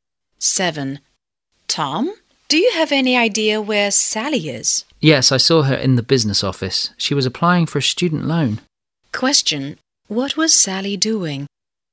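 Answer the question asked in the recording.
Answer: Applying for a student loan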